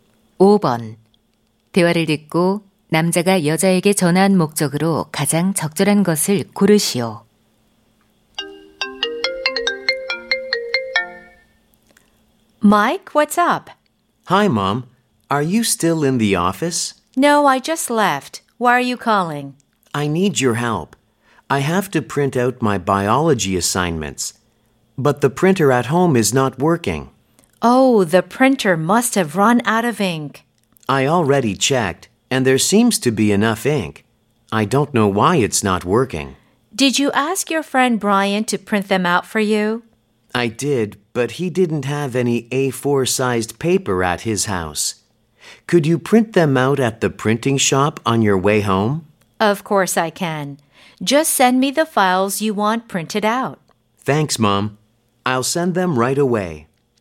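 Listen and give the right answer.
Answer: 인쇄소에서 과제를 출력해 달라고 부탁하려고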